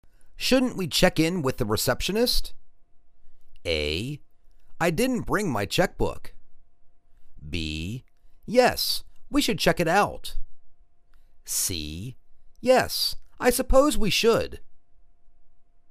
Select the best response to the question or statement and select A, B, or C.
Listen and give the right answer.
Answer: Yes, I suppose we should.